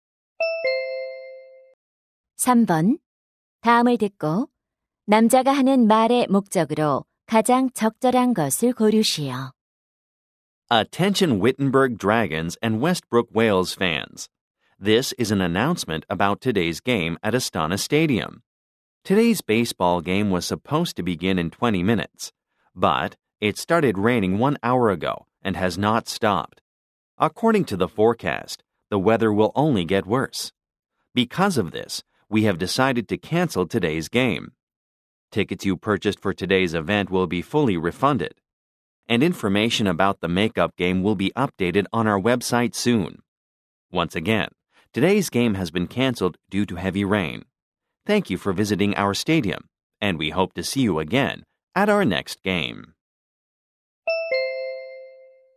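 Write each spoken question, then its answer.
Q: 다음을 듣고 남자가 하는 말의 목적으로 가장 적절한 것을 고르시오.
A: 폭우로 인한 오늘 야구 경기 취소를 알리려고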